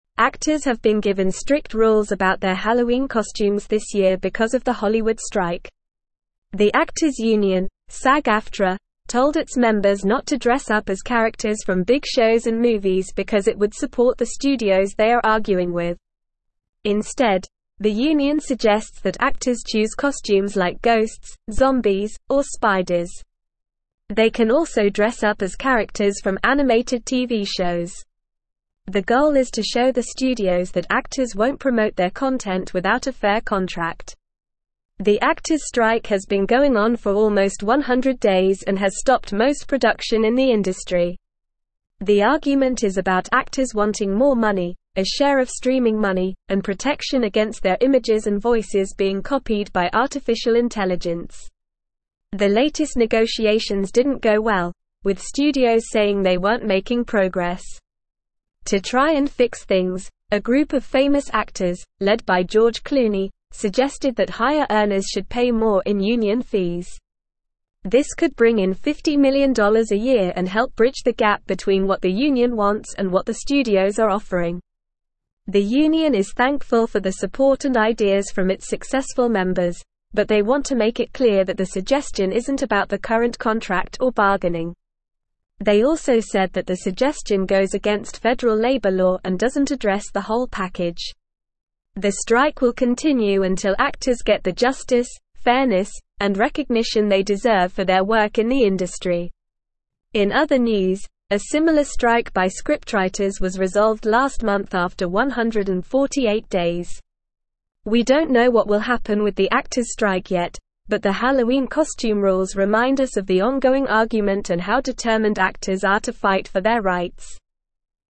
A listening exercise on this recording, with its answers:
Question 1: Actors have been given strict rules about their Halloween costumes this year because of the Hollywood (1)______.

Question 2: The actors' union, Sag-Aftra, told its members not to dress up as characters from big shows and movies because it would support the (2)______ they are arguing with.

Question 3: Instead, the union (3)______ that actors choose costumes like (4)______, zombies, or spiders.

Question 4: Instead, the union (3)______ that actors choose costumes like (4)______, zombies, or spiders.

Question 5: The actors' strike has been going on for almost 100 days and has (5)______ most production in the industry.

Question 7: The argument is about actors wanting more (6)______, a share of streaming money, and protection against their (7)______ and (8)______ being copied by artificial intelligence.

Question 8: The argument is about actors wanting more (6)______, a share of streaming money, and protection against their (7)______ and (8)______ being copied by artificial intelligence.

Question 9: To try and fix things, a group of famous actors, led by George Clooney, suggested that (9)______ earners should pay more in union fees.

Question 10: The union is thankful for the support and (10)______ from its successful (11)______, but they want to make it clear that the suggestion isn't about the (12)______ contract or bargaining.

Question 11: The union is thankful for the support and (10)______ from its successful (11)______, but they want to make it clear that the suggestion isn't about the (12)______ contract or bargaining.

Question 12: The union is thankful for the support and (10)______ from its successful (11)______, but they want to make it clear that the suggestion isn't about the (12)______ contract or bargaining.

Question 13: The strike will continue until (13)______ get the justice, fairness, and recognition they deserve for their work in the industry.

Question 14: In other news, a similar strike by scriptwriters was resolved last (14)______ after 148 days.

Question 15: We don't know what will happen with the actors' strike yet, but the Halloween costume rules (15)______ us of the (16)______ argument and how determined actors are to fight for their rights.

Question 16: We don't know what will happen with the actors' strike yet, but the Halloween costume rules (15)______ us of the (16)______ argument and how determined actors are to fight for their rights.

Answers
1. strike
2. studios
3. suggests
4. ghosts
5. stopped
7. images
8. voices
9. higher
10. ideas
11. members
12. current
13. actors
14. month
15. remind
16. ongoing

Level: Level 3